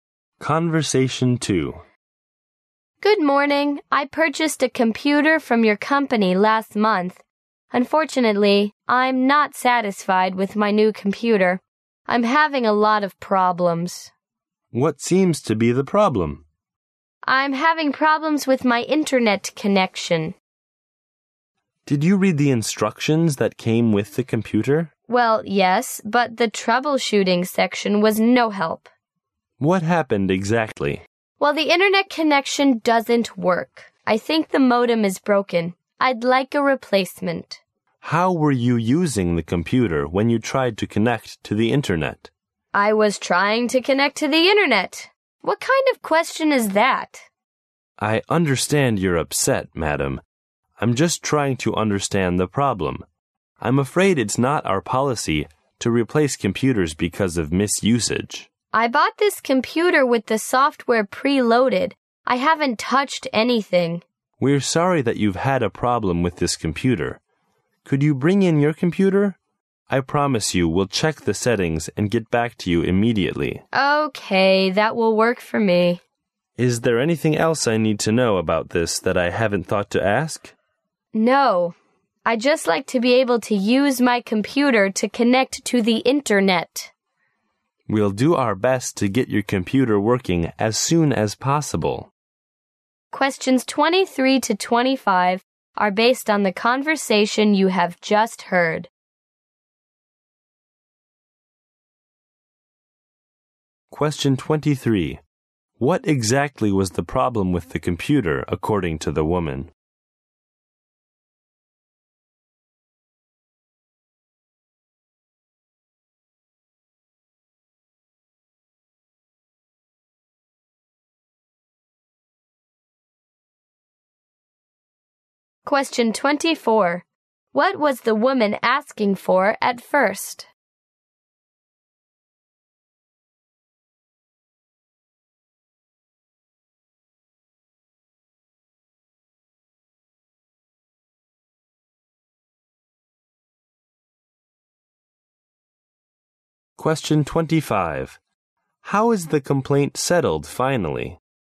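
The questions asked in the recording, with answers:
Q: What exactly was the problem with the computer, according to the woman?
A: The internet connection didn't work; she thought the modem was broken.

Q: What was the woman asking for at first?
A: A replacement

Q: How is the complaint settled finally?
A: She will bring the computer in so they can check the settings.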